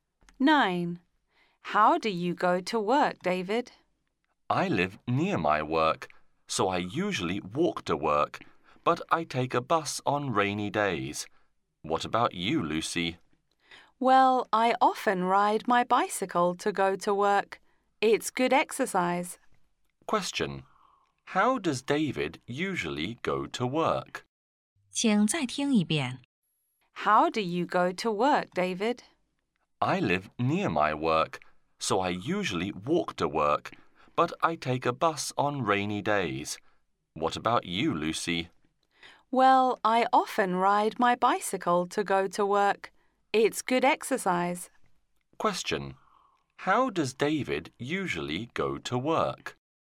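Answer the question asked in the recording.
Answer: He walks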